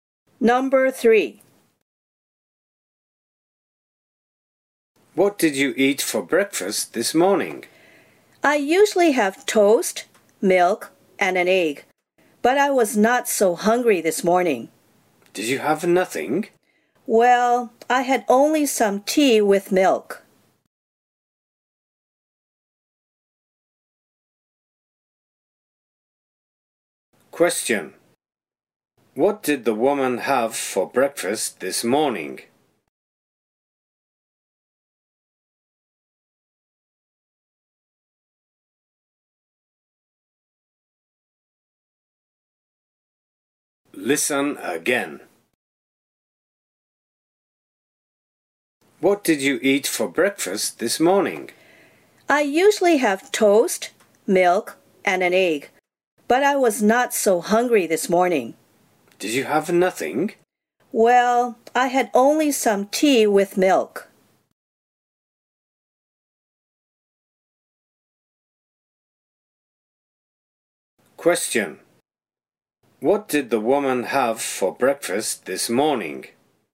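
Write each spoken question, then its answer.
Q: Question. What did the woman have for breakfast this morning?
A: Only some tea with milk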